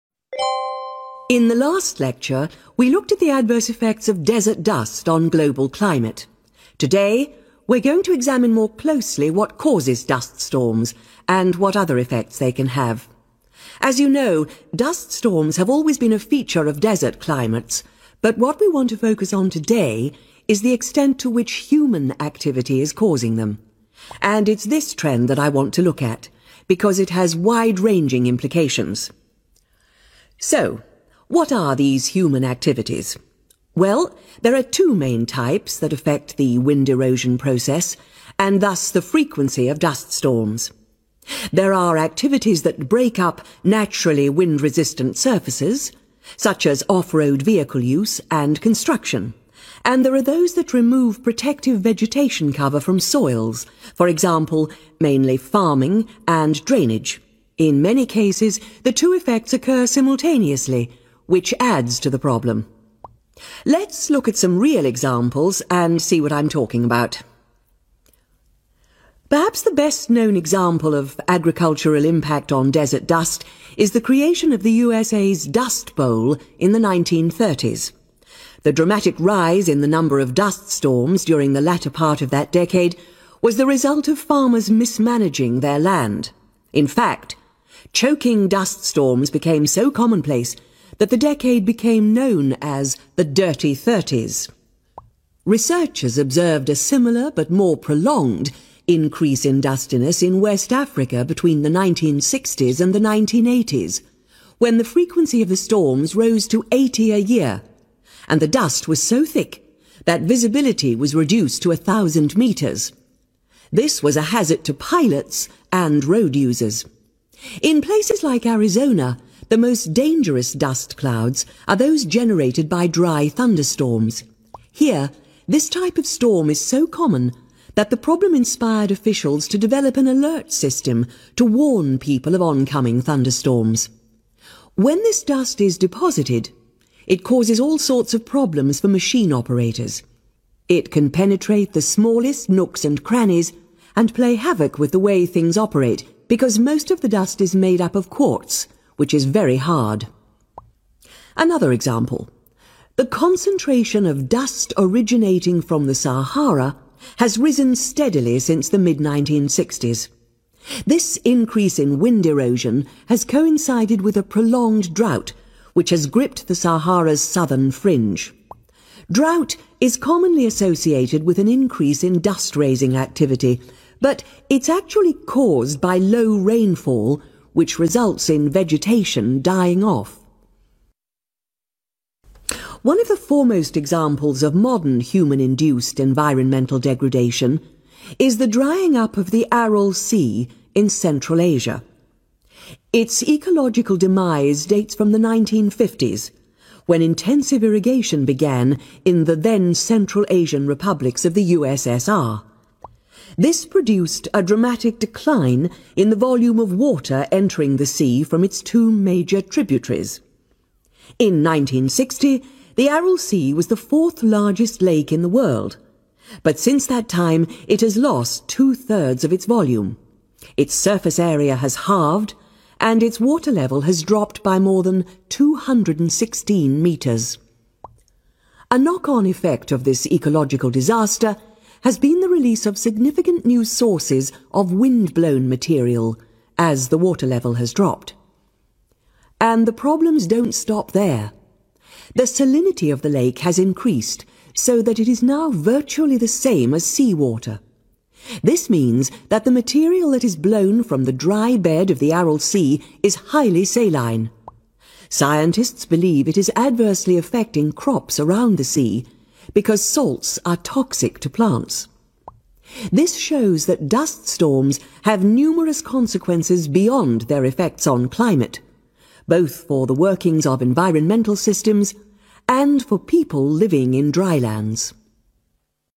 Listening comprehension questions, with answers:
Complete the notes below Write One WORD ONLY for each answer.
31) the impact of human 31 .................. on the occurrence of dust storms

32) remove protective plants, e.g. farming and 32 ..................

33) the USA 'dust bowl' caused by mismanagement of farmers 33 ..................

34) worst dust clouds arise from dry 34 .................. in Arizona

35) which are hazardous to machine 35 ..................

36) increased wind erosion has occurred along with long-term 36 .................. in Sahara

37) intensive 37 .................. in Central Asian Republics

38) total volume of water in lake reduced by 38 ..................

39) lake then has become more 39 ..................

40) serious effects on 40 .................. nearby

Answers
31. activity
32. drainage
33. land
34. thunderstorms
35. operators
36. drought
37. irrigation
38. two-thirds
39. saline
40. crops